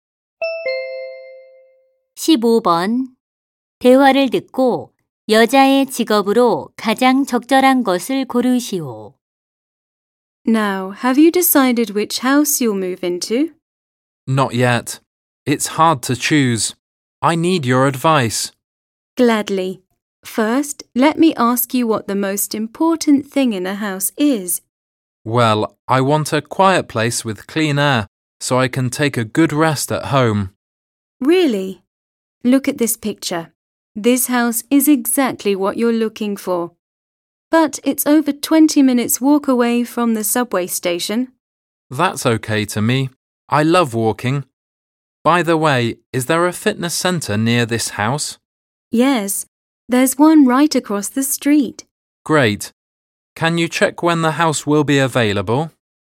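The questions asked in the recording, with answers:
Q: 대화를 듣고 여자의 직업으로 가장 적절한 것을 고르시오.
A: 부동산 중개인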